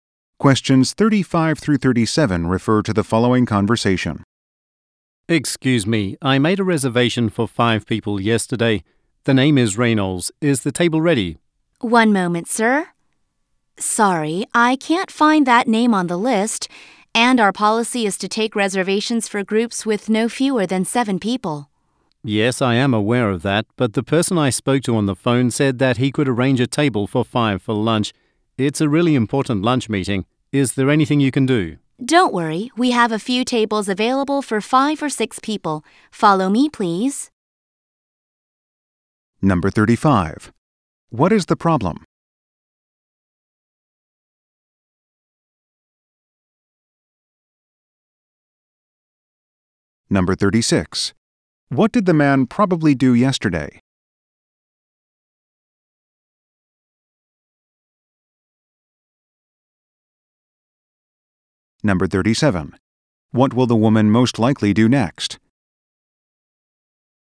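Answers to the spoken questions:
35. The man's reservation is not on the list
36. Called to reserve a table for 5
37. Show the man to a table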